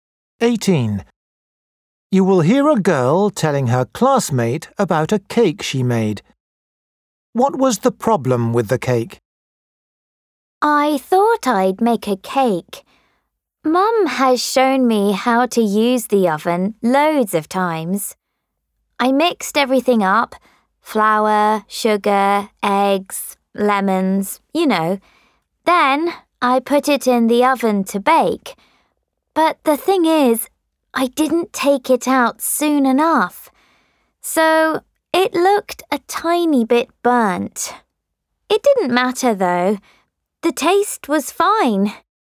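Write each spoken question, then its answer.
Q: What was the problem with the cake?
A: it was left in the oven too long and looked a bit burnt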